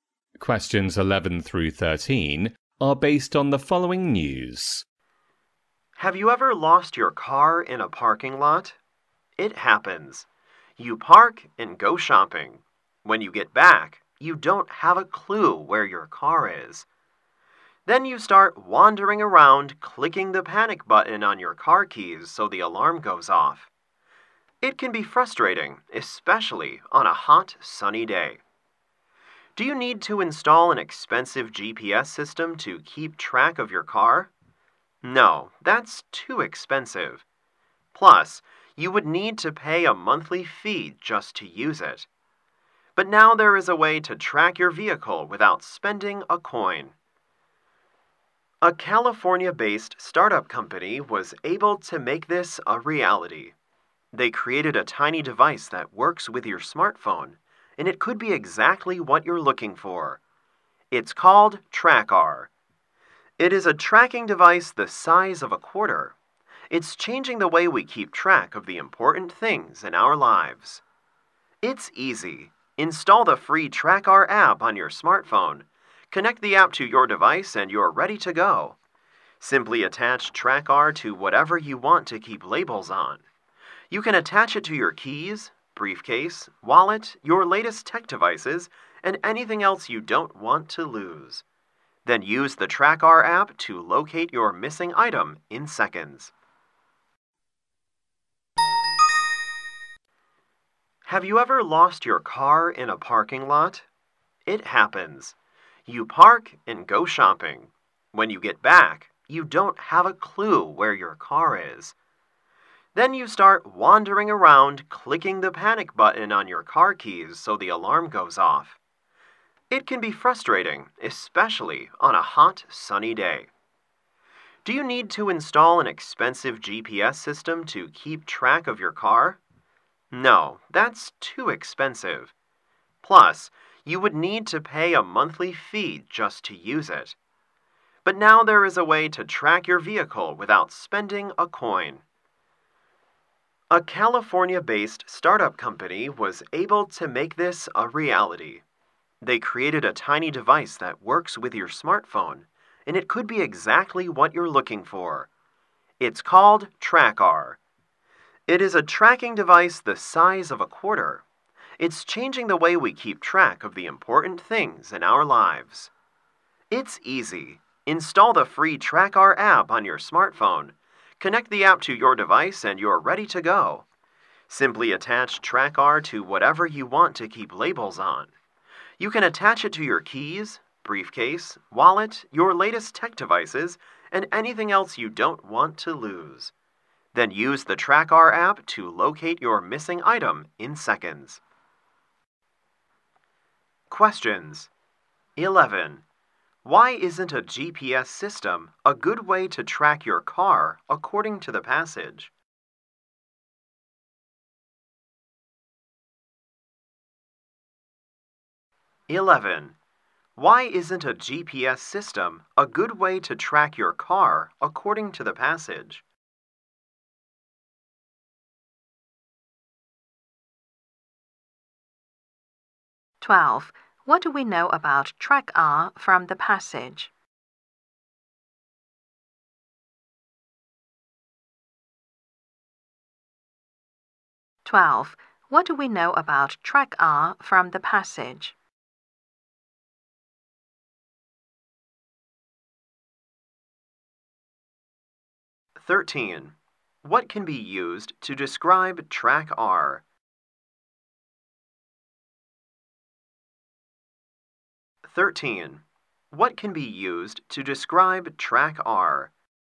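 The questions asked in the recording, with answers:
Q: Why isn't a GPS system a good way to track your car according to the passage?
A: It's too expensive, with a monthly fee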